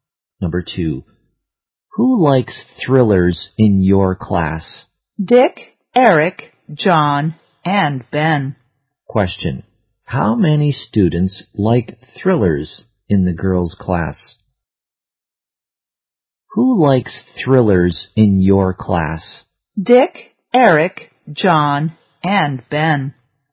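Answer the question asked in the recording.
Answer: Four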